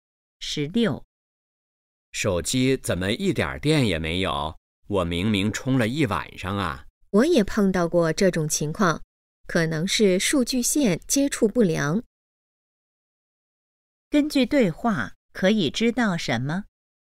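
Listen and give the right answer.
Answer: 手机没充上电,可能是数据线接触不良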